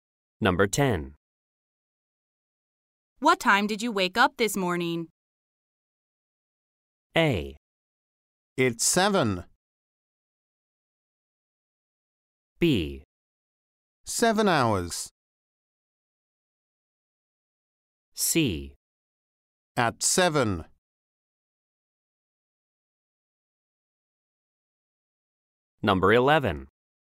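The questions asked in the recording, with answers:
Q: What time did you wake up this morning?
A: C: At 7.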